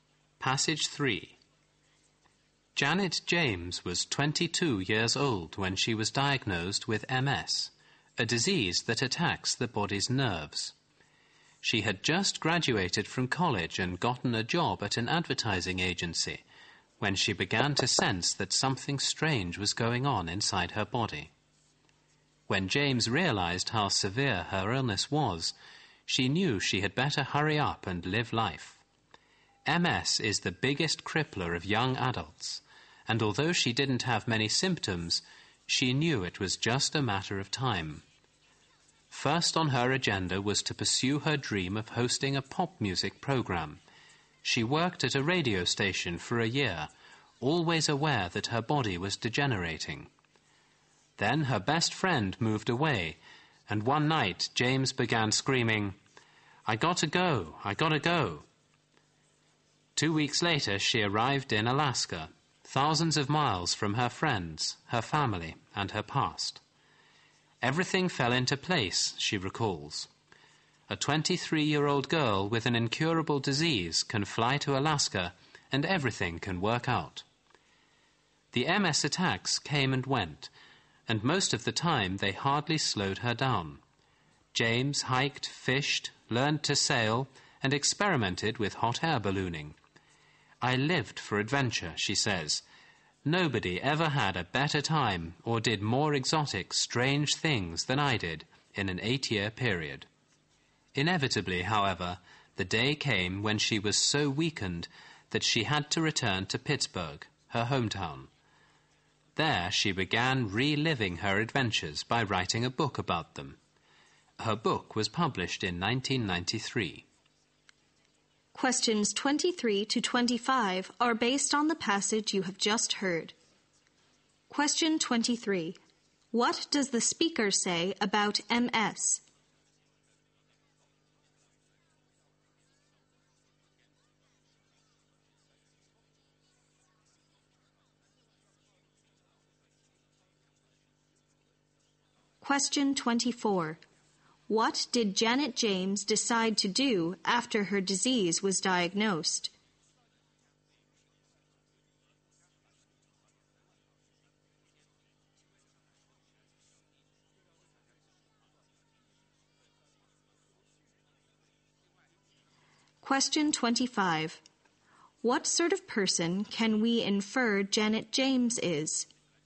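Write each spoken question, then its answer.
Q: What does the speaker say about MS?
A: It is the biggest crippler of young adults.

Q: What did Janet James decide to do after her disease was diagnosed?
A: Hurry up and live life, starting with her dream of hosting a pop music program.

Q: What sort of person can we infer Janet James is?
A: Adventurous and optimistic.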